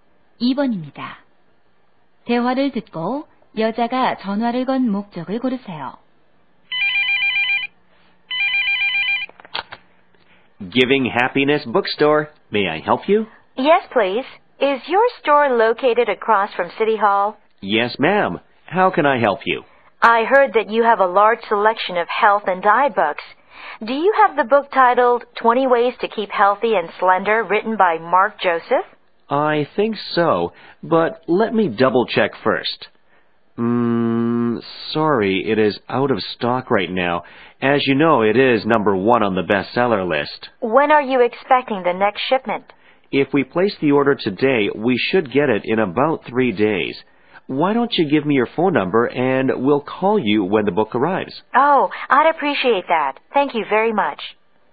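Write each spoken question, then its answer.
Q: 대화를 듣고 여자가 전화를 건 목적을 고르세요.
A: 책이 있는지 확인하려고 (20 Ways to Keep Healthy and Slender)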